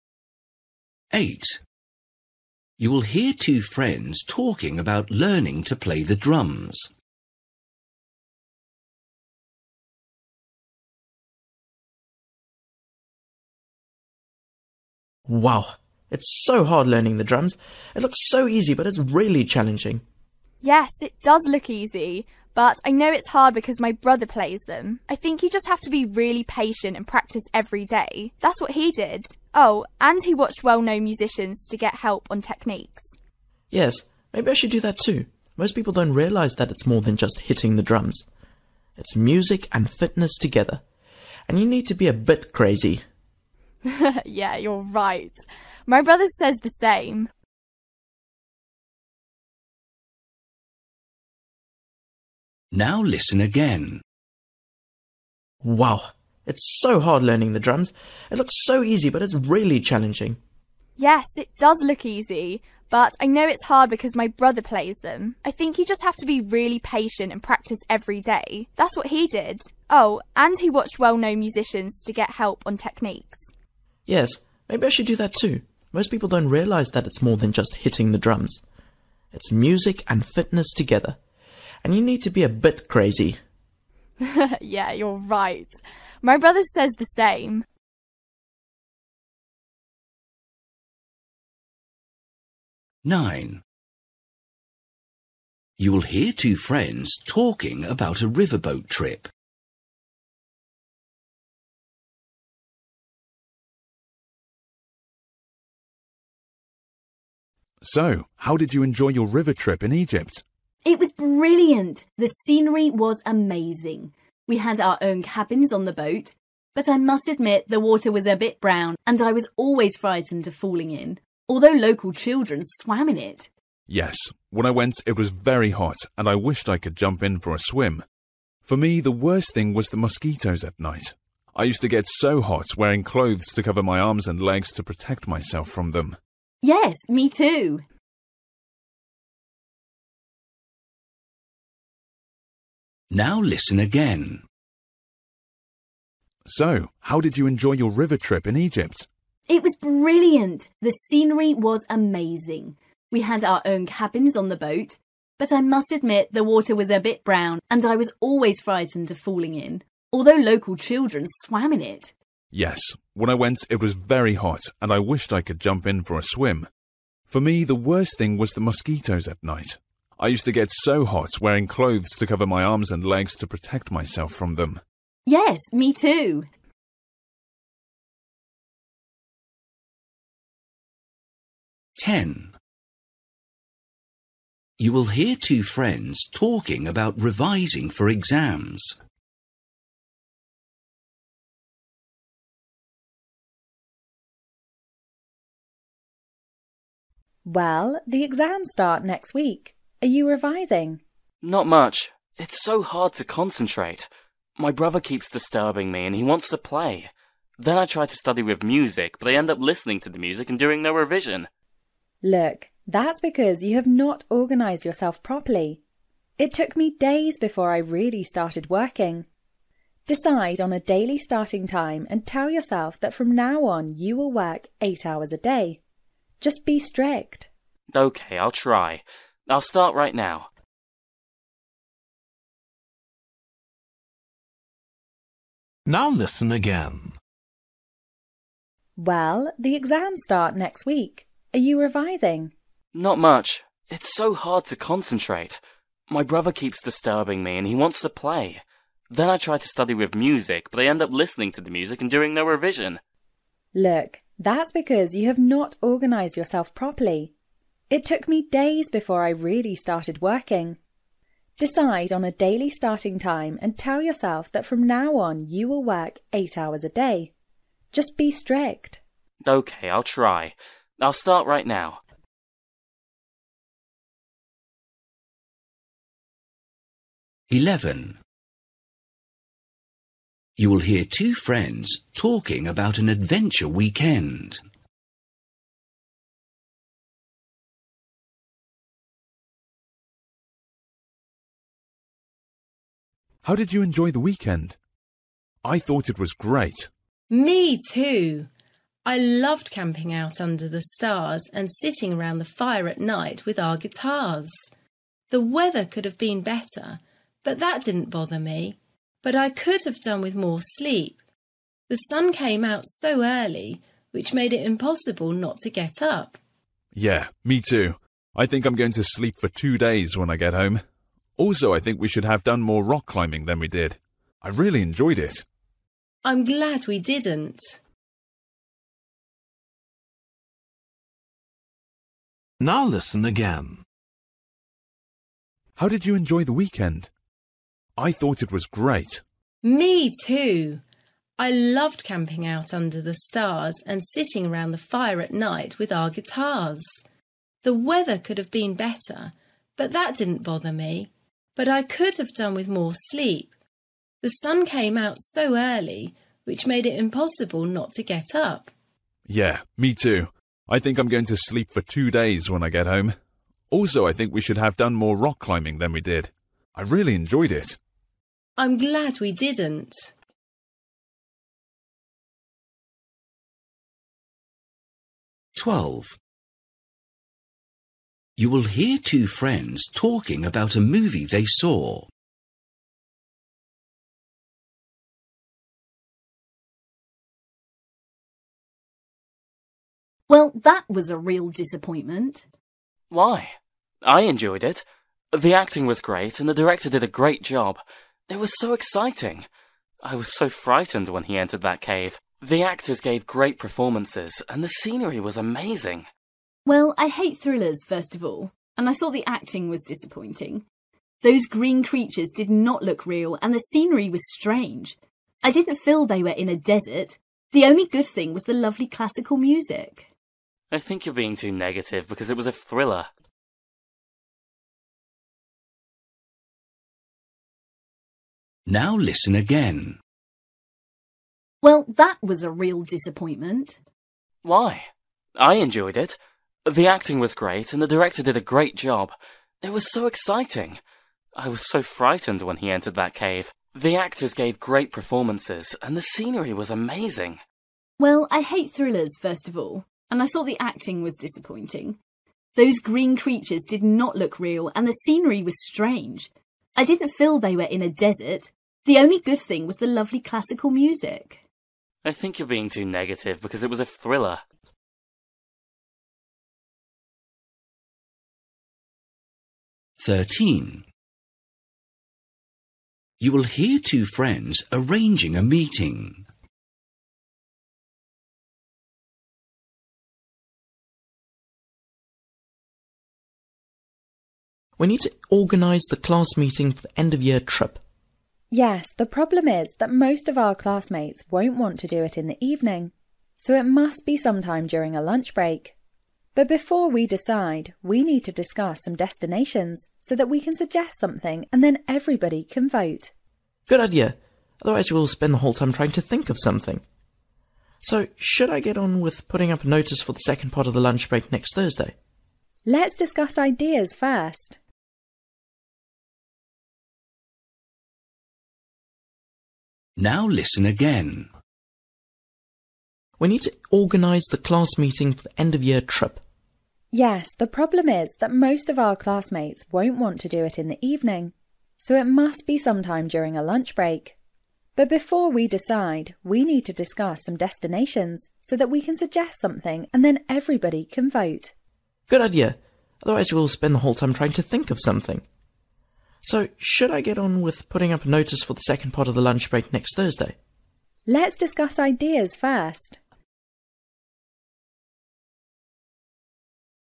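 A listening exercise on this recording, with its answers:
For each question, choose the correct answer.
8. You will hear two friends talking about learning to play the drums. They agree that playing drums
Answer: needs fitness as well as music

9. You will hear two friends talking about a river boat trip. What did the boy like the least about it?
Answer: the mosquitoes at night

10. You will hear two friends talking about revising for exams. The girl advises the boy to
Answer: organise himself with a fixed daily starting time

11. You will hear two friends talking about an adventure weekend. They agree that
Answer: they did not get enough sleep

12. You will hear two friends talking about a movie they saw. The girl thinks that the movie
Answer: had lovely music but was otherwise disappointing

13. You will hear two friends arranging a meeting. The girl thinks that first they should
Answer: discuss destination ideas

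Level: Luyện nghe trình độ B1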